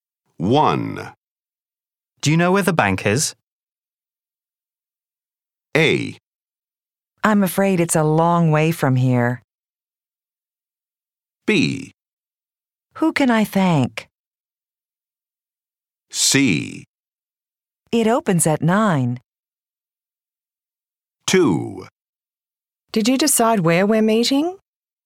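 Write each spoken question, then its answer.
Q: Do you know where the bank is?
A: A: I'm afraid it's a long way from here.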